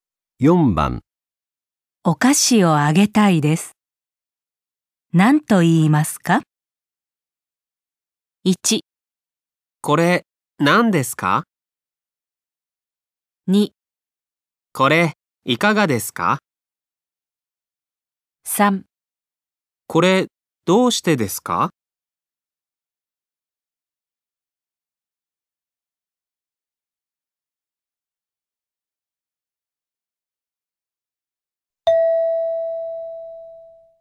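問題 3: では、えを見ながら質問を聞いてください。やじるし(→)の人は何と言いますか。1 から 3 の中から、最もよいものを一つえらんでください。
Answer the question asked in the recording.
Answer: これいかがですか

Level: N5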